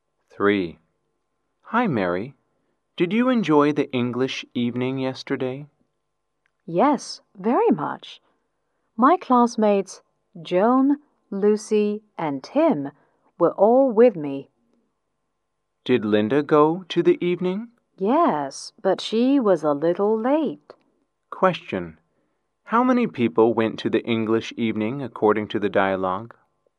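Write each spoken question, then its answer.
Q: How many people went to the English evening according to the dialogue?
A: Five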